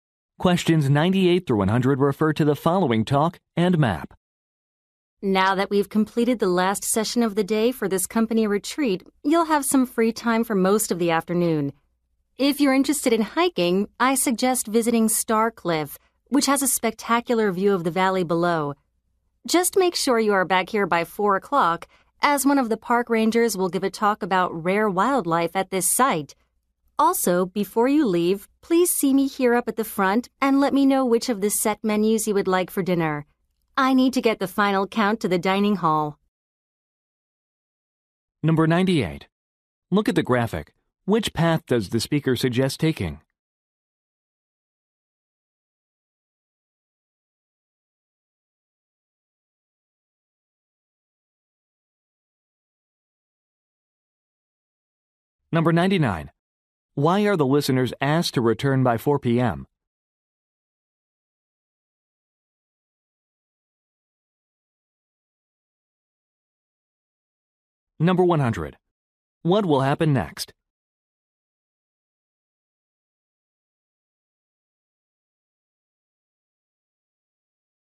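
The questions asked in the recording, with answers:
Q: Why are the listeners asked to return by 4 p.m.?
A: To attend a park ranger's talk on rare wildlife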